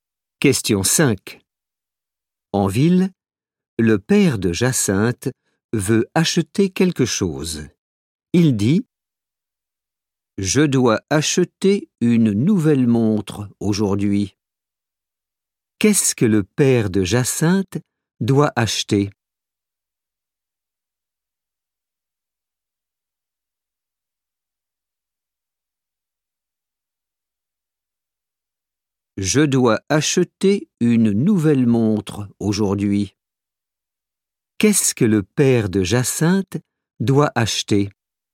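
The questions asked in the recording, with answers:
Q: Qu'est-ce que le père de Jacinthe doit acheter ?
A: une nouvelle montre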